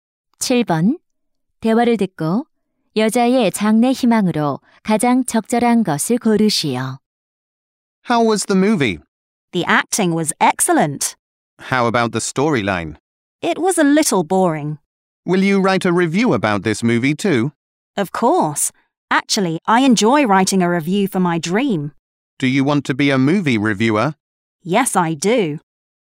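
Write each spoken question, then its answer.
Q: 대화를 듣고 여자의 장래 희망으로 가장 적절한 것을 고르시오.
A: 영화 평론가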